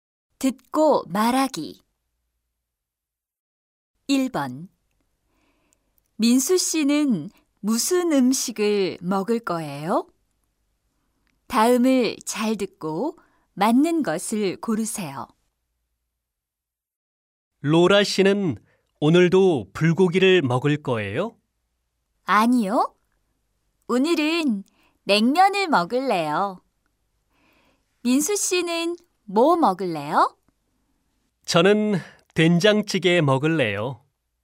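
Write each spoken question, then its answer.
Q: 민수 씨는 무슨 음식을 먹을 거예요?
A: 된장찌개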